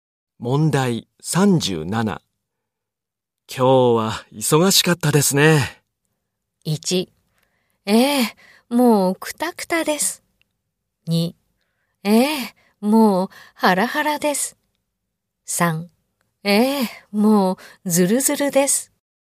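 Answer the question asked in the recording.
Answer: 1: ええ、もうクタクタです。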